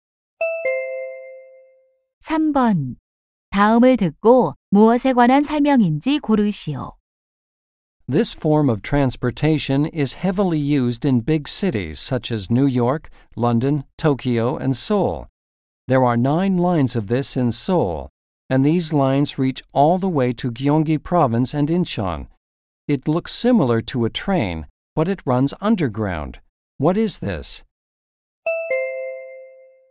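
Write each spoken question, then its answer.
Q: 다음을 듣고 무엇에 관한 설명인지 고르시오.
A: 지하철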